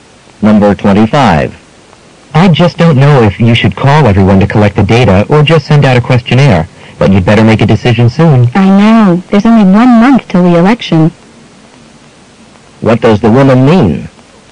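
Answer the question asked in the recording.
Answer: She knows she must decide soon because the election is a month away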